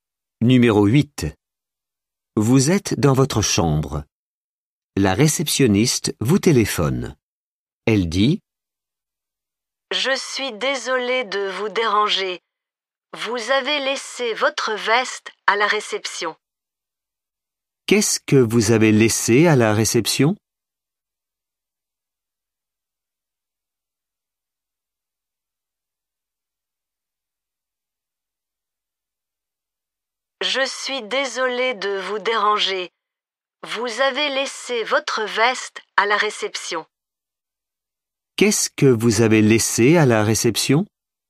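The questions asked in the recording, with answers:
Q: Qu'est-ce que vous avez laissé à la réception?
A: votre veste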